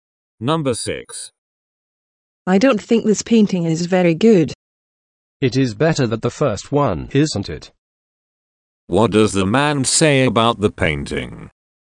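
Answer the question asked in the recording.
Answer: It is better than the first one.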